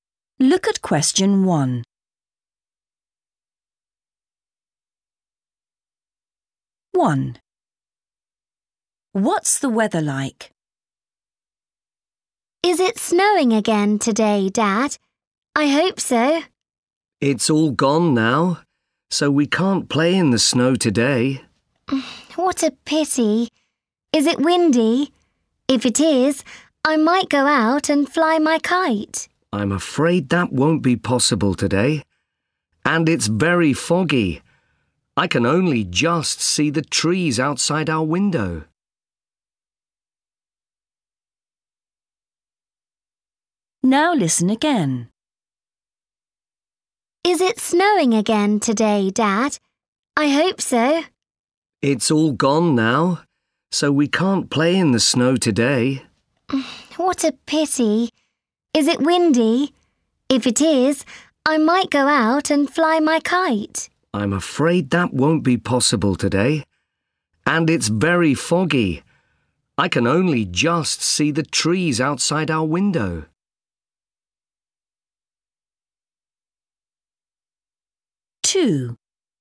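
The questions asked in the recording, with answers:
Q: What's the weather like?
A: foggy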